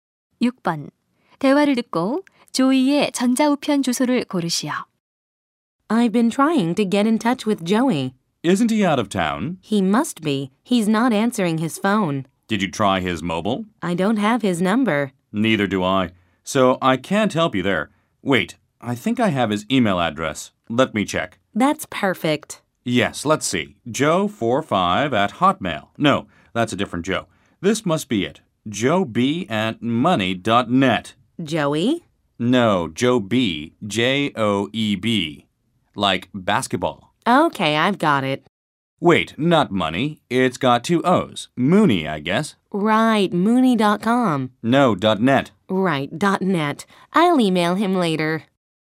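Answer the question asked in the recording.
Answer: joeb@mooney.net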